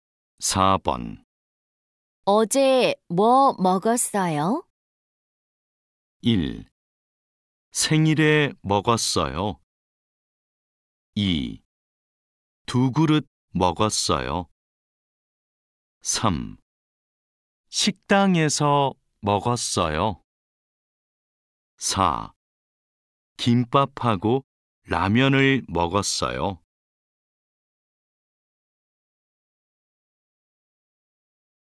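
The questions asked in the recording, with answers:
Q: 어제 뭐 먹었어요?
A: 4: 김밥하고 라면을 먹었어요.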